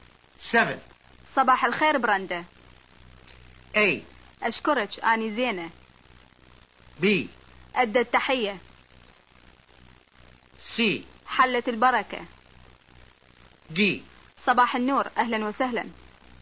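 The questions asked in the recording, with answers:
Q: صباح الخير براندا.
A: D: صباح النور أهلا وسهلا.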